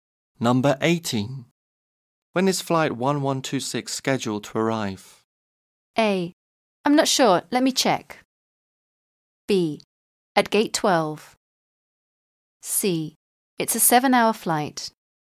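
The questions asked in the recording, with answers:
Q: When is flight 1126 scheduled to arrive?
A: A: I'm not sure. Let me check.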